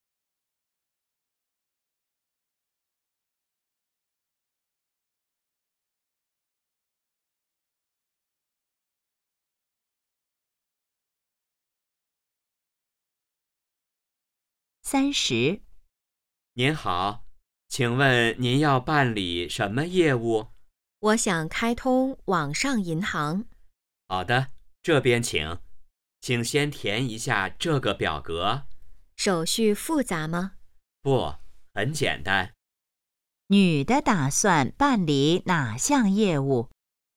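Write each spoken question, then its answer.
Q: 女的打算办理哪项业务?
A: 开通网上银行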